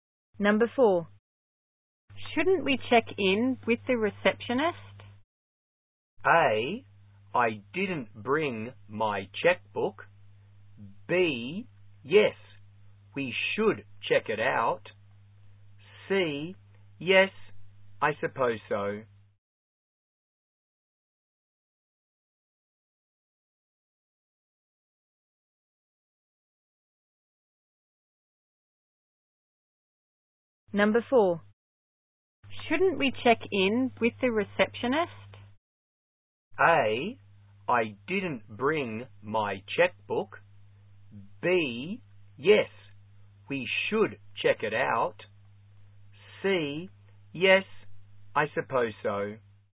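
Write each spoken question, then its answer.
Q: Shouldn't we check in with the receptionist?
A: C: yes, I suppose so.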